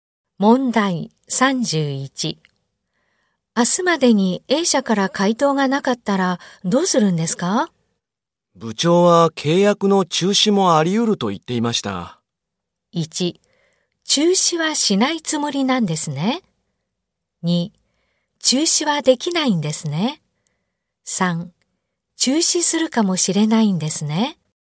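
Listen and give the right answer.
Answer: 3: 中止するかもしれないんですね。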